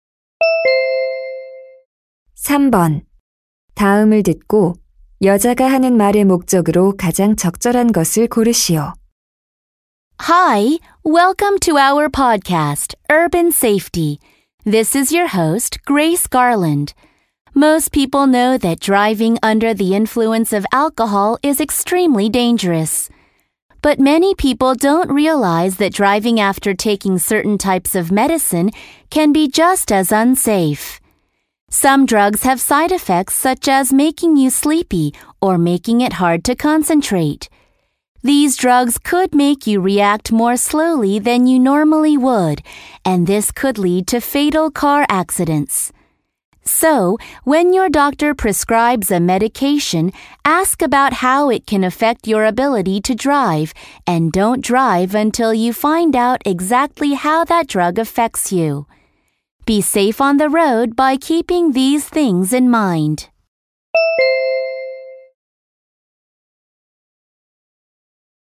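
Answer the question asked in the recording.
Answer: 특정 약물 복용 후 운전의 위험성을 경고하려고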